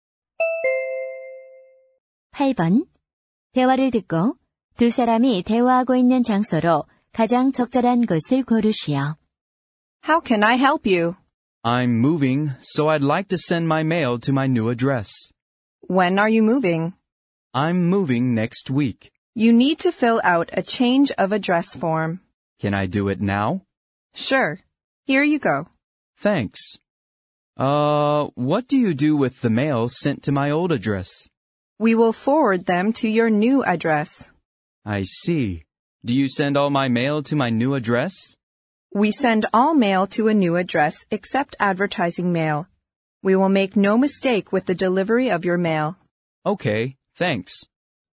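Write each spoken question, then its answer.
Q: 대화를 듣고 두 사람이 대화하고 있는 장소로 가장 적절한 곳을 고르시오.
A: 우체국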